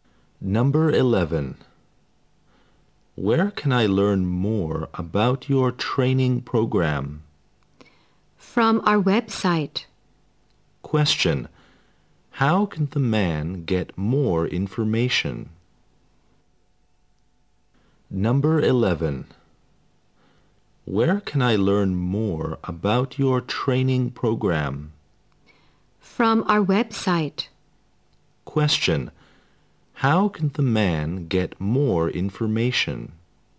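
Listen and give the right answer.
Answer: From the website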